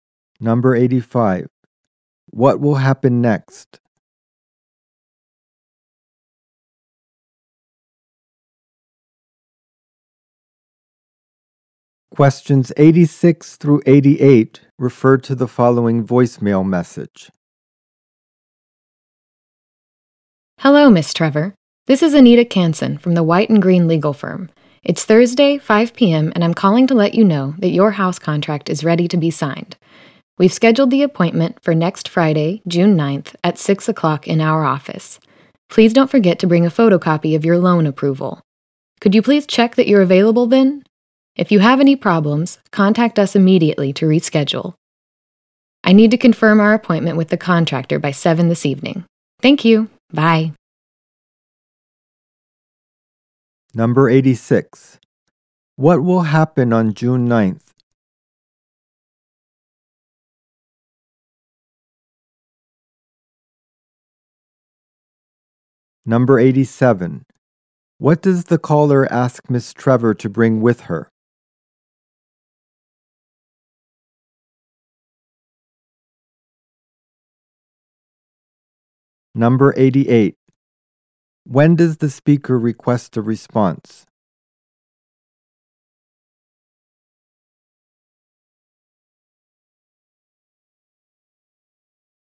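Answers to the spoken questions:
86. A house contract will be signed.
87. A photocopy of her loan approval
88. By 7 this evening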